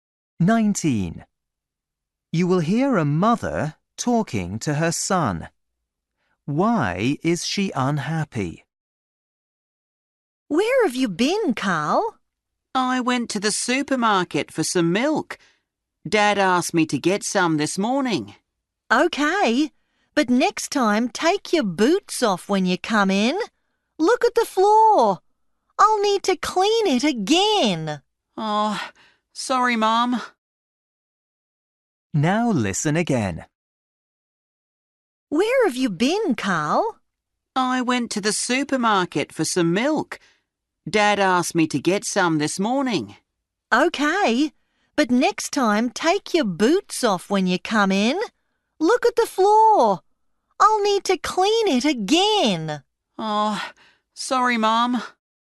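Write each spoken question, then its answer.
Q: Why is she unhappy?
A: He didn't take his boots off and made the floor dirty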